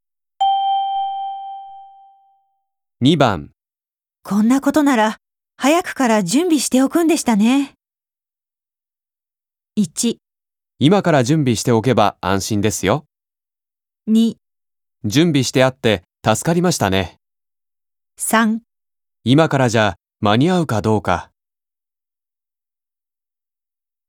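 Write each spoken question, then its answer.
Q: こんなことなら、早くから準備しておくんでしたね。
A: 3: 今からじゃ、間に合うかどうか。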